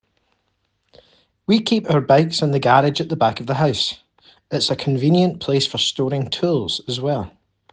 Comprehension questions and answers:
Answer the following questions. Write NO MORE THAN TWO WORDS AND/OR A NUMBER for each answer.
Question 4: Where are the bikes stored?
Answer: garage

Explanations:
We keep our bikes in the garage at the back of the house.